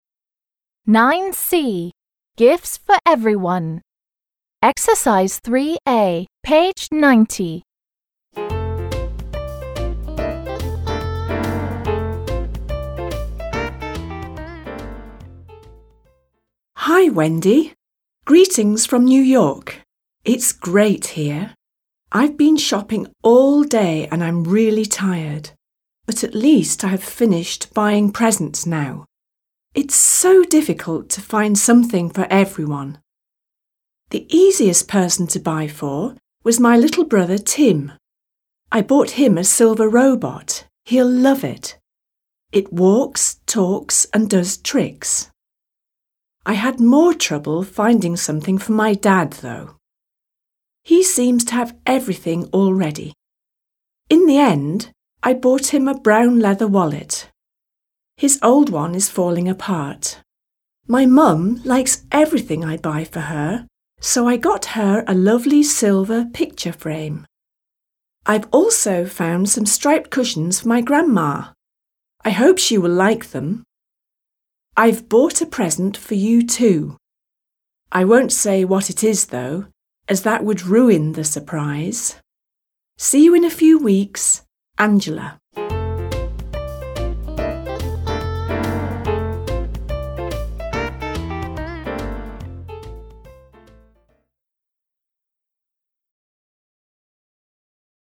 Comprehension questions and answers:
3. b. Answer the questions. Then act out a telephone conversation between Angela and her mum about the presents she has bought for each member of her family.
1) What has Angela been doing?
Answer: Angela has been shopping all day.

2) What has she bought for her little brother?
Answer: She bought a silver robot for her little brother.

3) Why did she buy her dad a wallet?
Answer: She bought her dad a wallet because his old one is falling apart.

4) Who doesn't mind what present they get?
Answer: Angela's mum doesn't mind what present they get.

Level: 7 класс